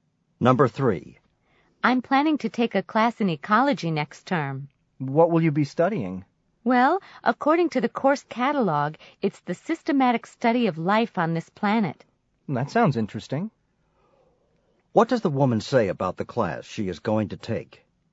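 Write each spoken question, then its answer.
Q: What does the woman say about the class she is going to take?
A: It is the systematic study of life on this planet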